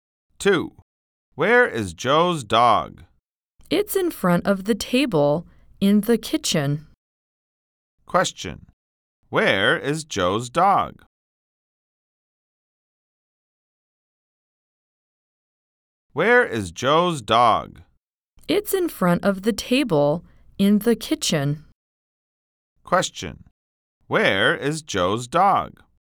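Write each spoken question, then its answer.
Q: Where is Joe's dog?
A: In front of the table in the kitchen.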